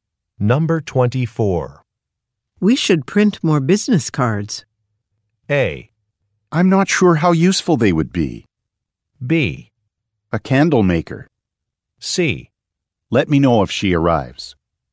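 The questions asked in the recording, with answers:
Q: We should print more business cards.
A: A: I'm not sure how useful they would be.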